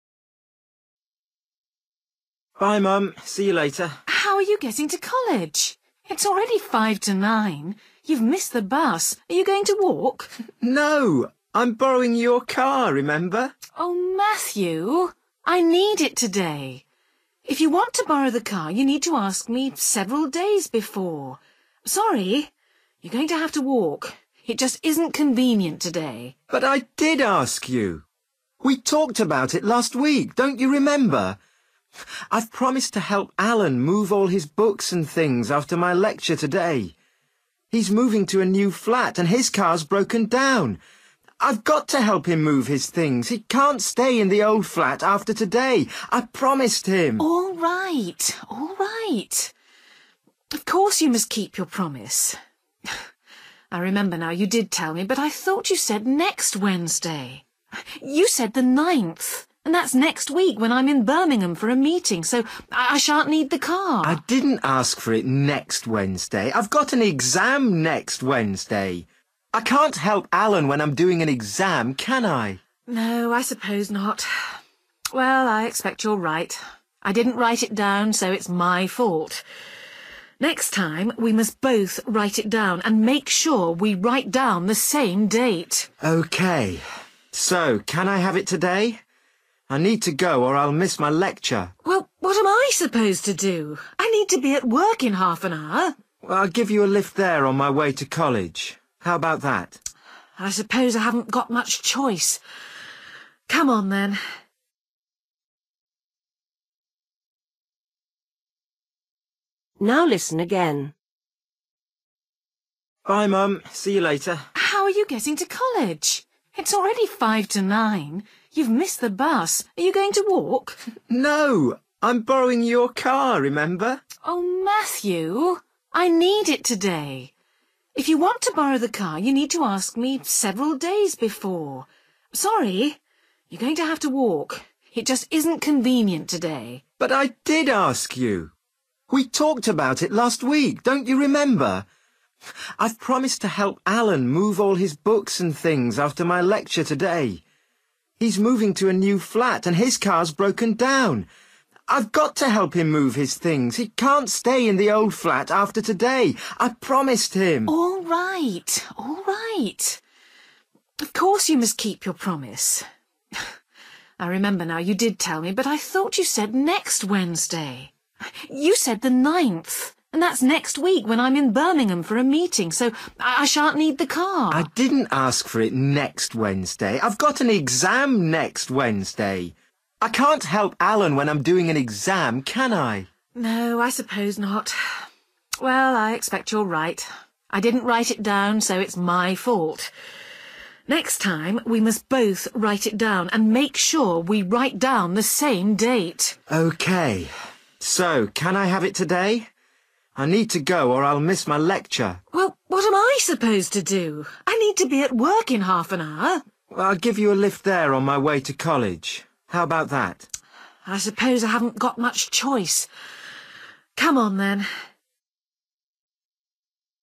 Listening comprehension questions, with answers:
Decide if each sentence is correct or incorrect. If it is correct, choose the letter A for YES. If it is not correct, choose the letter B for NO.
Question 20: Matthew had intended to catch the bus this morning.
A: NO

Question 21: Matthew thought his mother knew he wanted the car this morning.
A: YES

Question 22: Matthew is going to help Alan to repair his car.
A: NO

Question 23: Matthew needs the car next Wednesday.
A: NO

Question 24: Matthew's mother agrees she made a mistake.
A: YES

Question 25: Matthew has the car in the end.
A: YES

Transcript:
Matthew: ... Bye, Mum, see you later.
Mother: How are you getting to college? It's already five to nine. You've missed the bus. Are you going to walk?
Matthew: No, I'm borrowing your car, remember?
Mother: Oh Matthew, I need it today. If you want to borrow the car you need to ask me several days before. Sorry, you're going to have to walk. It just isn't convenient today.
Matthew: But I did ask you. We talked about it last week. Don't you remember? I've promised to help Alan move all his books and things after my lecture today. He's moving to a new flat and his car's broken down. I've got to help him move his things – he can't stay in the old flat after today. I promised him.
Mother: All right, all right. Of course, you must keep your promise. I remember now, you did tell me, but I thought you said next Wednesday. You said the 9th and that's next week when I'm in Birmingham for a meeting so I shan't need the car.
Matthew: I didn't ask for it next Wednesday! I've got an exam next Wednesday! I can't help Alan when I'm doing an exam, can I?
Mother: No, I suppose not. Well, I expect you're right. I didn't write it down so it's my fault. Next time we must both write it down, and make sure we write down the same date!
Matthew: OK. So can I have it today? I need to go or I'll miss my lecture.
Mother: Well, what am I supposed to do? I need to be at work in half an hour.
Matthew: I'll give you a lift there on my way to college. How about that?
Mother: I suppose I haven't got much choice. Come on, then.

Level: B1